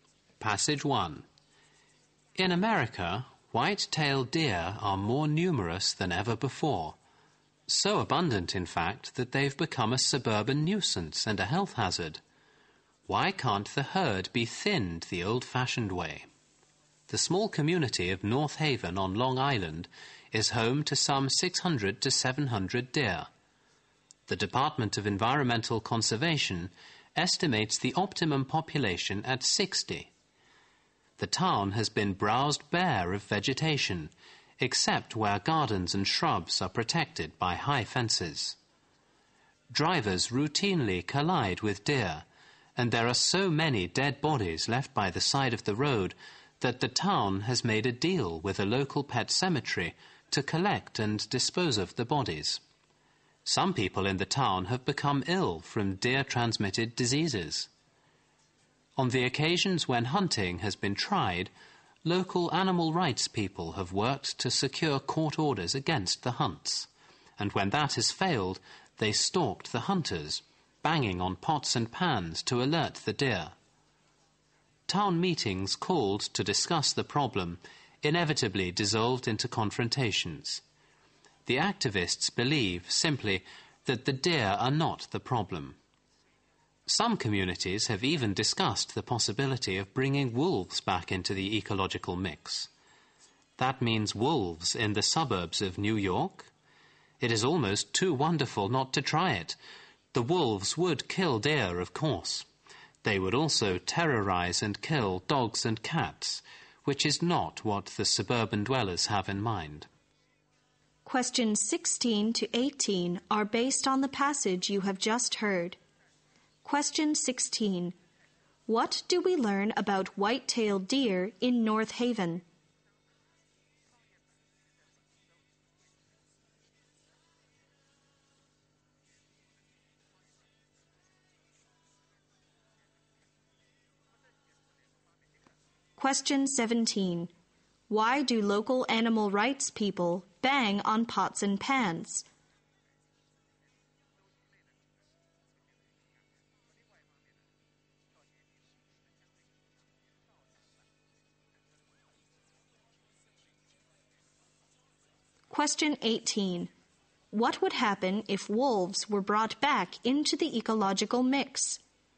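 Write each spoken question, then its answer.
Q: What do we learn about white-tailed deer in North Haven?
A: There are far too many of them, about 600-700 compared with an optimum of 60.

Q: Why do local animal rights people bang on pots and pans?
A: To alert the deer to the hunters.

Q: What would happen if wolves were brought back into the ecological mix?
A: The wolves would also kill people's dogs and cats.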